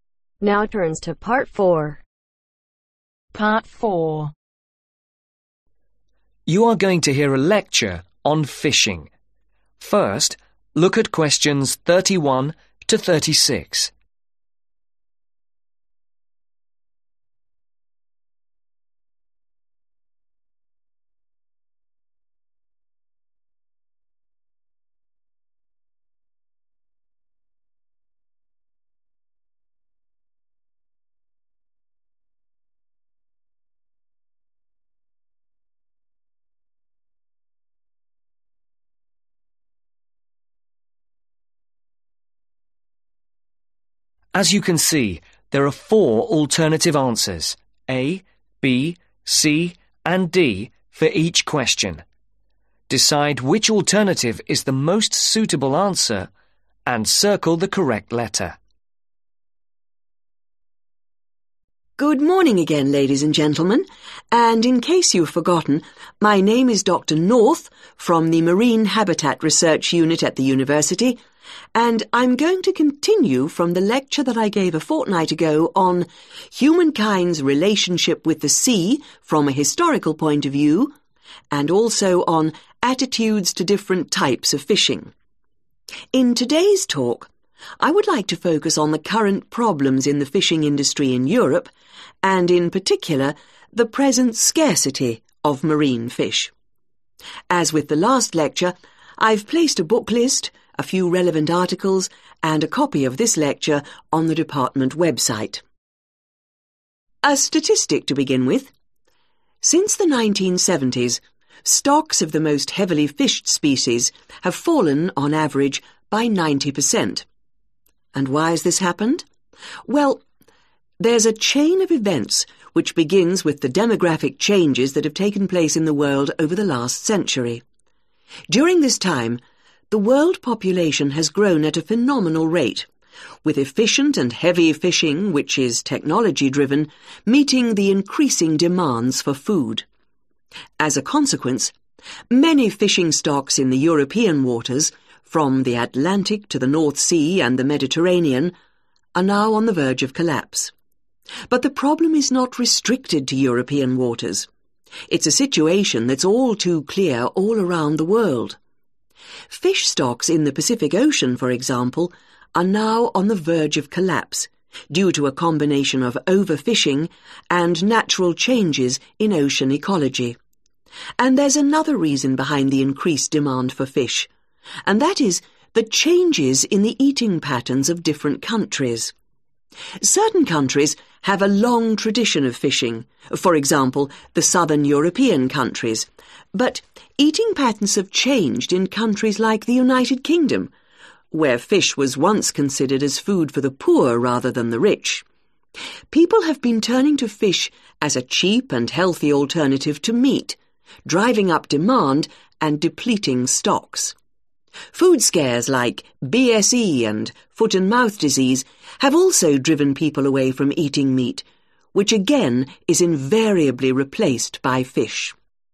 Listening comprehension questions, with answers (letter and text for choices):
Circle the correct letters.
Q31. In a previous lecture, Dr North talked about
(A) the Marine Habital Research unit.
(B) humankind's relationship with sailing.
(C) humankind's relationship with sea.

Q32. The focus of today's talk will be on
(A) problems the fishing industry faces worldwide.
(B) marine fish recipes.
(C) European fishing problems.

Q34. During the last century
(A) stocks of rare species have fallen dramatically.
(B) the world population has grown very fast.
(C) fishing has become less efficient but heavier.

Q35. As well as over-fishing which of the following is a research for fishing stock being on the point of collapse in the public ?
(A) Ocean ecology has changed.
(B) Fishing has spread to international waters.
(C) Fish has become cheaper.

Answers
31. (C) humankind's relationship with sea.
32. (C) European fishing problems.
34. (B) the world population has grown very fast.
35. (A) Ocean ecology has changed.